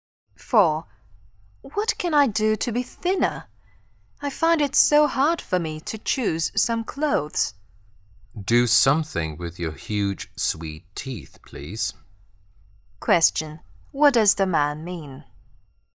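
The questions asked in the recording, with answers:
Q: What does the man mean?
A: She should eat fewer sweets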